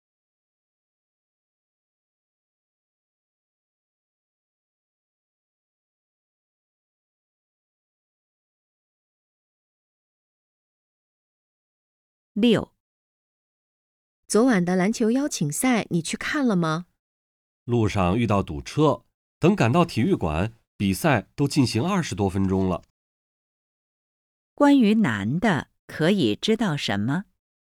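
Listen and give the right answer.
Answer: 他路上遇到堵车,到体育馆时比赛已经开始二十多分钟了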